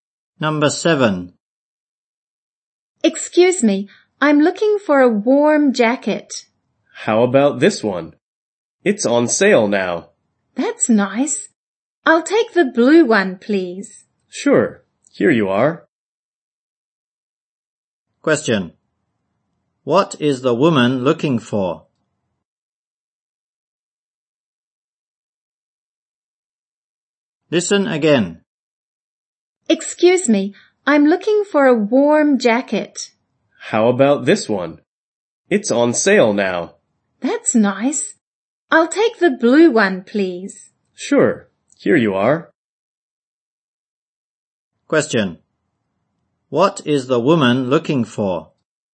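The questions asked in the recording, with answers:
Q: What is the woman looking for?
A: A warm jacket.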